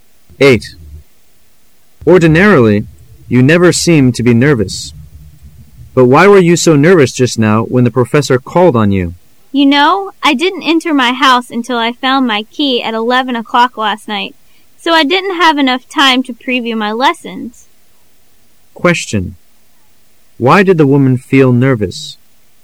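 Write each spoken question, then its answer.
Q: Why did the woman feel nervous?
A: She hadn't had enough time to preview her lessons

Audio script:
[解析] M: Ordinarily you never seem to be nervous. But why were you so nervous just now when the professor called on you? W: You know,I didn't enter my house until I found my key at 11 o' clock last night, so I didn't have enough time to preview my lessons. Q: Why did the woman feel nervous?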